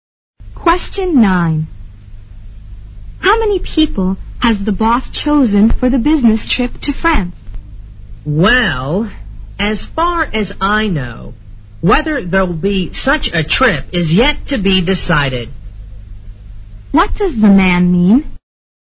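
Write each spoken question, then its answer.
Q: What does the man mean?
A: It's not yet decided whether there will be a trip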